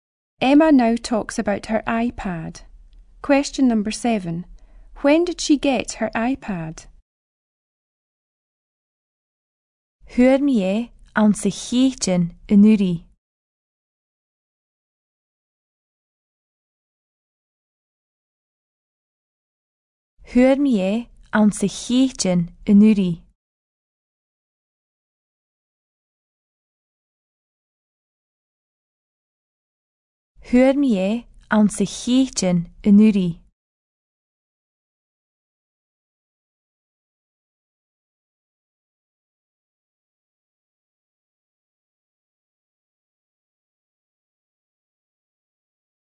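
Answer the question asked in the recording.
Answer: In May last year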